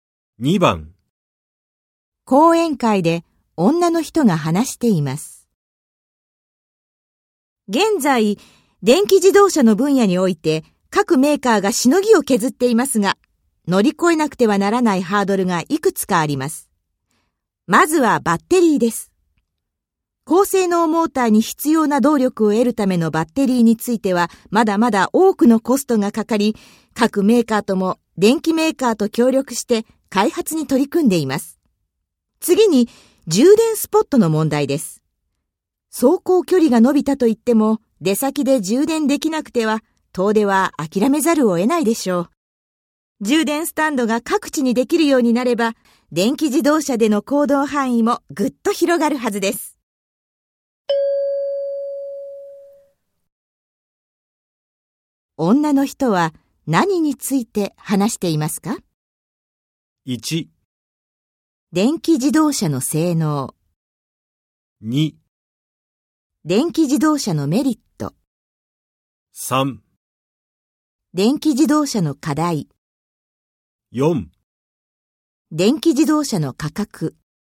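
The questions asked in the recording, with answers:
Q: 女の人は何について話していますか?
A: 3: 電気自動車の課題。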